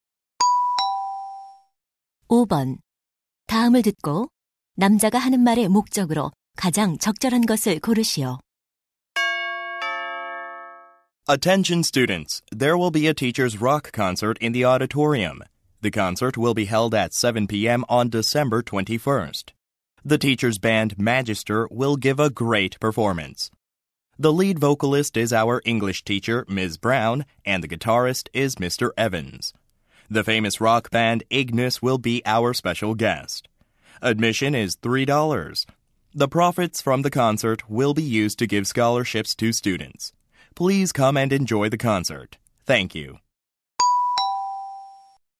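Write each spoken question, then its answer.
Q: 다음을 듣고 남자가 하는 말의 목적으로 가장 적절한 것을 고르시오.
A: 교사 록 콘서트를 홍보하려고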